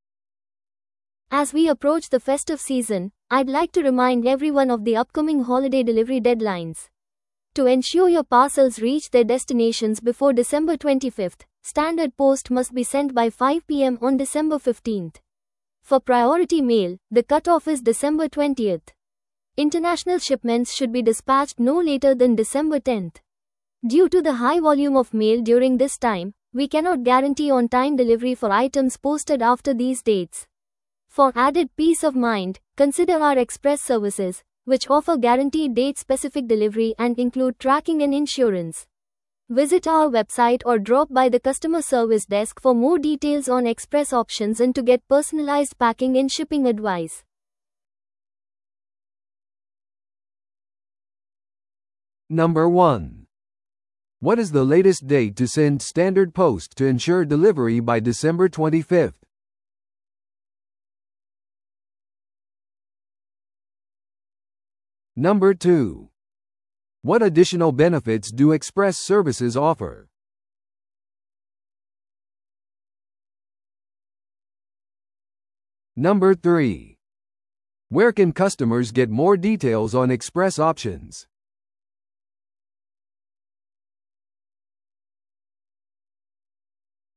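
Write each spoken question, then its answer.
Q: What is the latest date to send standard post to ensure delivery by December 25th?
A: December 15th, by 5 p.m.

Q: What additional benefits do express services offer?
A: Guaranteed date-specific delivery, with tracking and insurance

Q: Where can customers get more details on express options?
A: On the website or at the customer service desk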